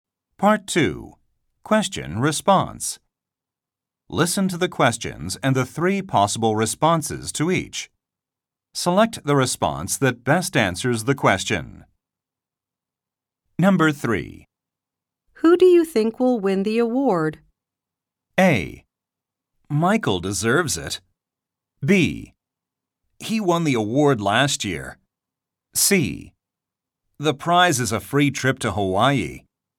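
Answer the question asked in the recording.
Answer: A: Michael deserves it.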